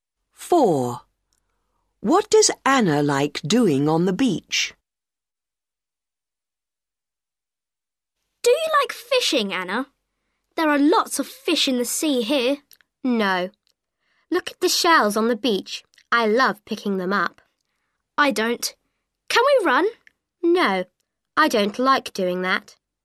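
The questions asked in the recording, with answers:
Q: What does Anna like doing on the beach?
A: Picking up shells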